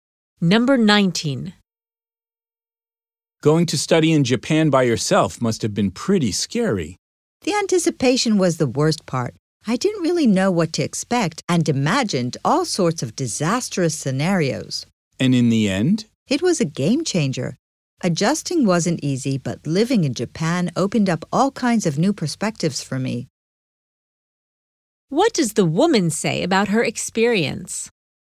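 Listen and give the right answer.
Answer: It was life-changing and opened new perspectives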